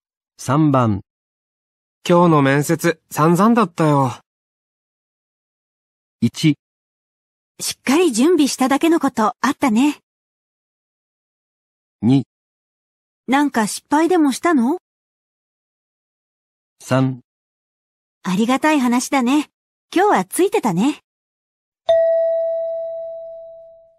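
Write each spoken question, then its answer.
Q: 今日の面接、散々だったよ。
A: 2: なんか失敗でもしたの?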